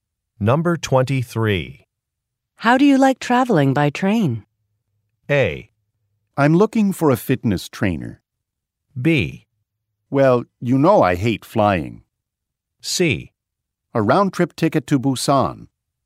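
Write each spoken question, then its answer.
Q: How do you like traveling by train?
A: B: Well, you know I hate flying.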